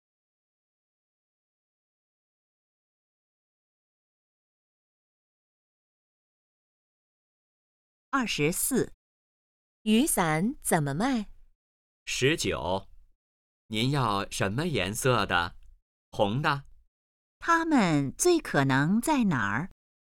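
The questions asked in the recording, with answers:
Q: 他们最可能在哪儿?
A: 商店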